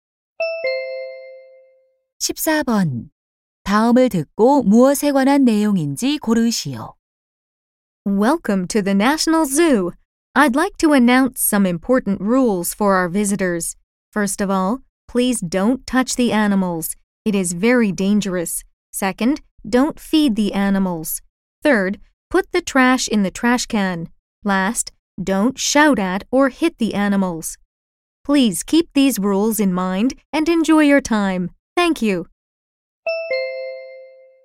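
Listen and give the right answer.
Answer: 동물원 관람 규칙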